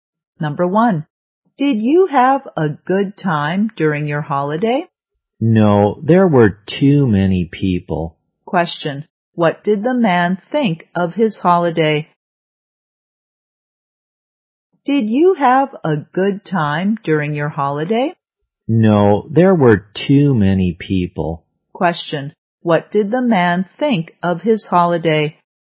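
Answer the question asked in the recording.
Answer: It wasn't good; there were too many people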